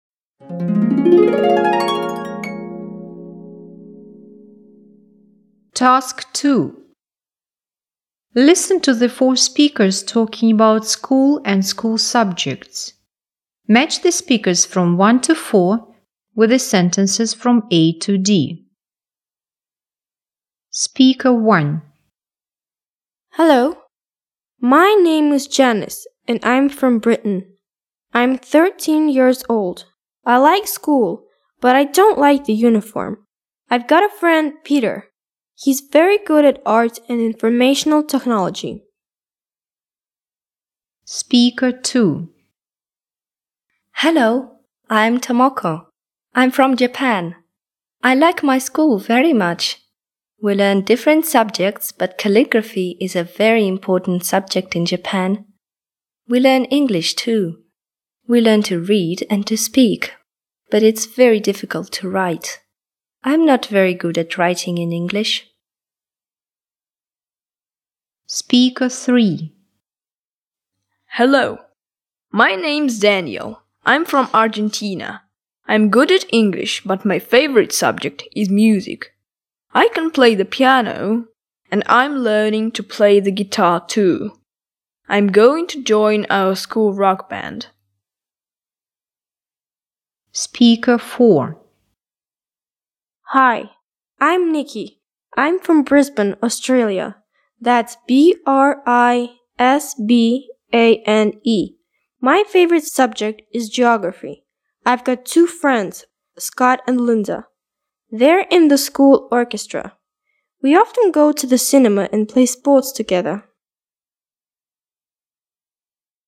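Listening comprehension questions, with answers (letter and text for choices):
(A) This person likes Music best of all.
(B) This person's friend is good at Art.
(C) This person finds it difficult to write in English.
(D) This person likes to spend time with his friends.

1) Speaker 1.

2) Speaker 2.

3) Speaker 3.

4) Speaker 4.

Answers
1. (B) This person's friend is good at Art.
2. (C) This person finds it difficult to write in English.
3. (A) This person likes Music best of all.
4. (D) This person likes to spend time with his friends.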